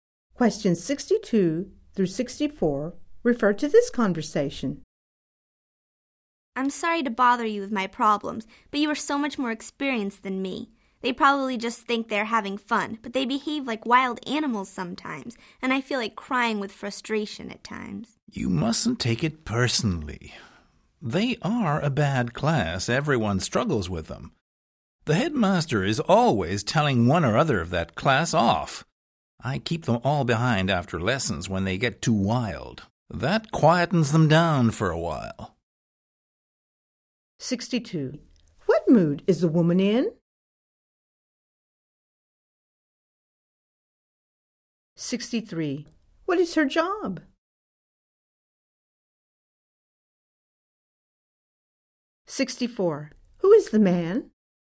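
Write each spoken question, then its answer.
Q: What mood is the woman in?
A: Frustrated

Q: What is her job?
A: Teacher

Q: Who is the man?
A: A more experienced teacher colleague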